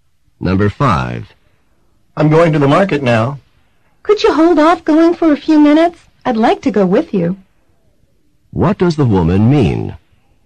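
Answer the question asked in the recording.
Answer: She wants the man to wait a few minutes so she can go with him.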